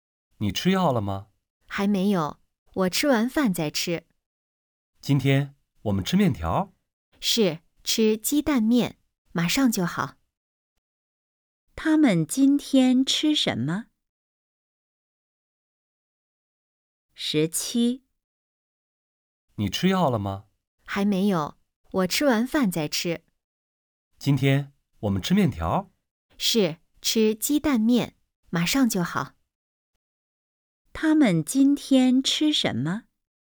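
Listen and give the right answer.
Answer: 鸡蛋面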